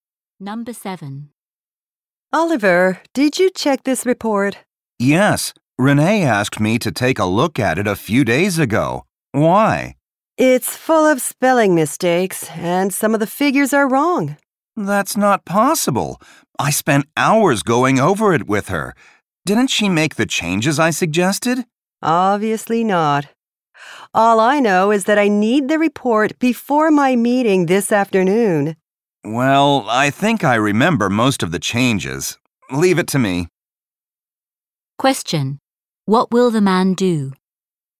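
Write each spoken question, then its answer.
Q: Question. What will the man do?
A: Make the corrections to the report himself.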